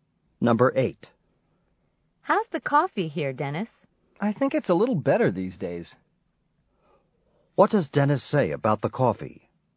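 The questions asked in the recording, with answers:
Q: What does Dennis say about the coffee?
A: It's a little better these days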